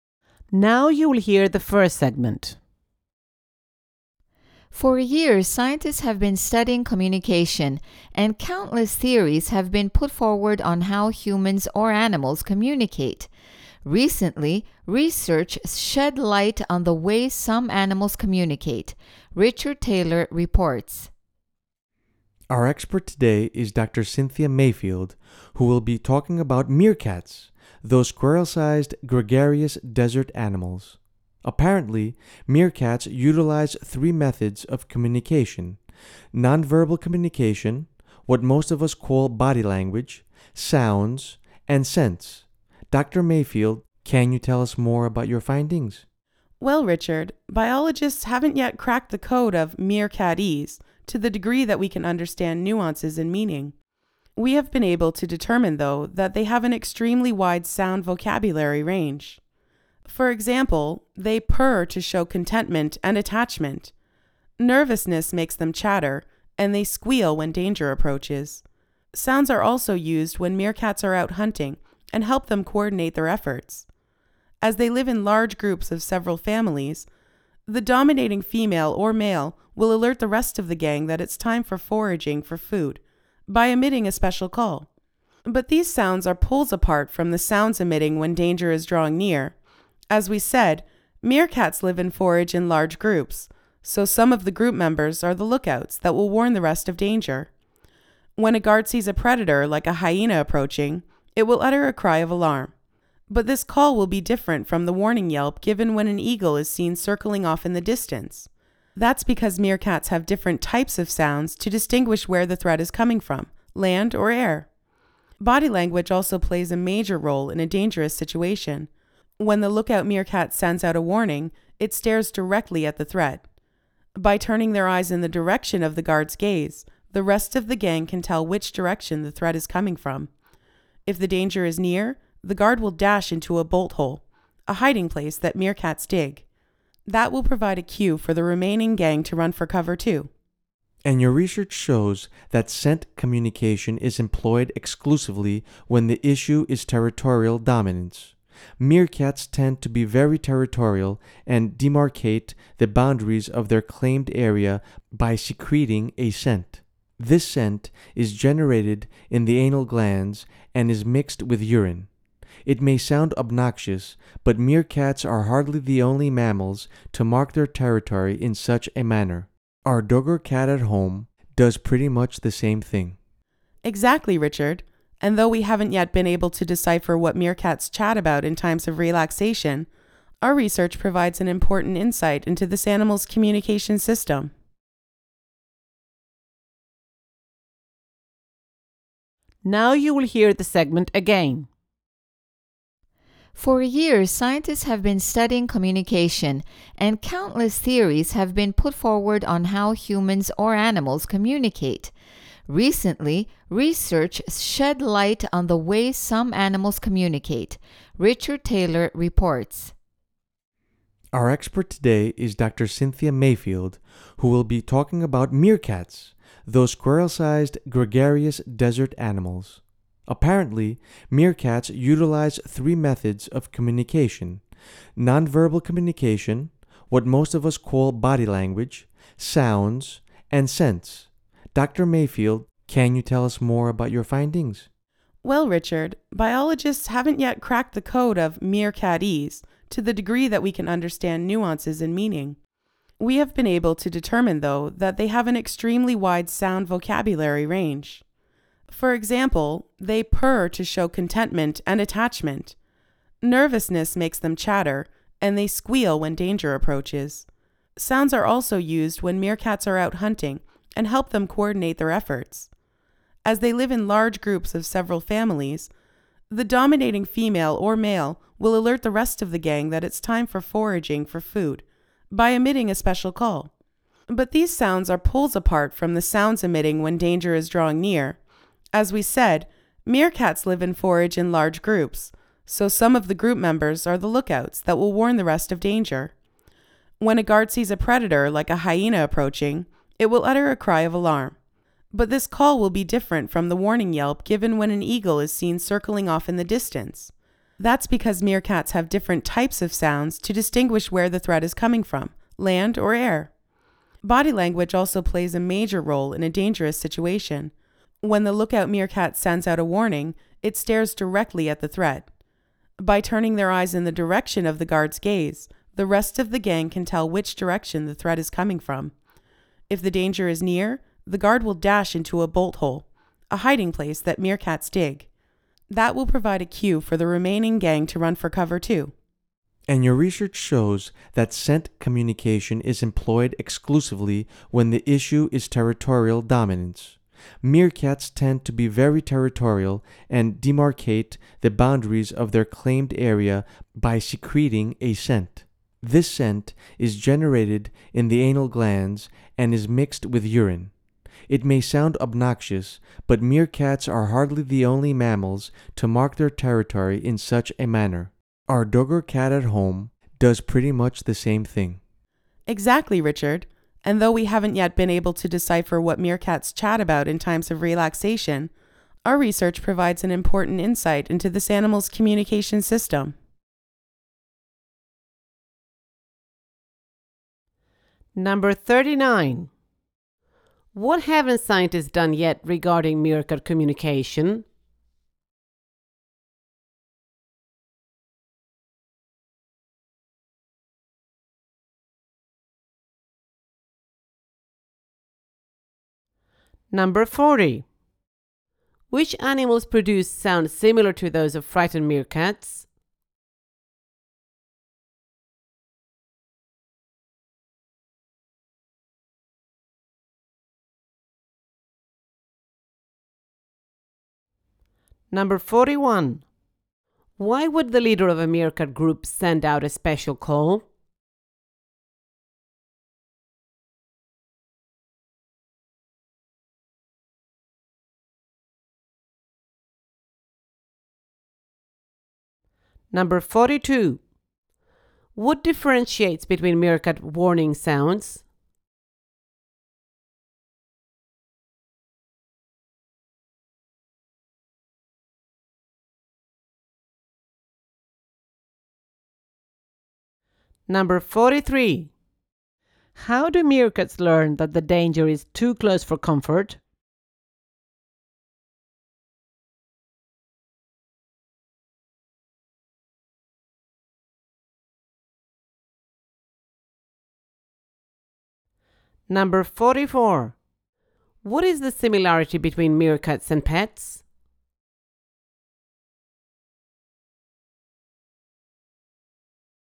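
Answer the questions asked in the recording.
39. They haven't cracked the code of meerkat communication well enough to understand its nuances and meaning.
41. To tell the group it's time to forage for food.
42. Where the threat comes from: land or air.
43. The guard dashes into a bolt hole.
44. Both mark their territory with scent and urine.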